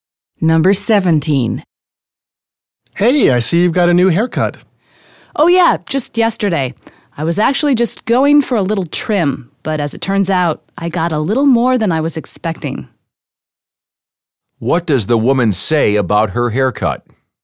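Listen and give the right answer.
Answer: It's shorter than she expected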